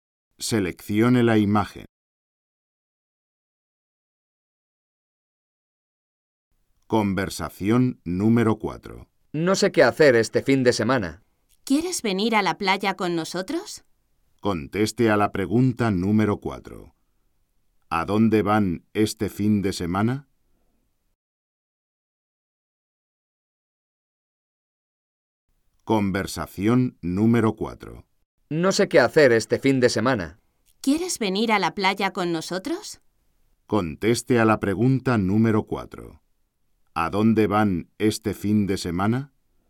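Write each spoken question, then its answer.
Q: ¿A dónde van este fin de semana?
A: A la playa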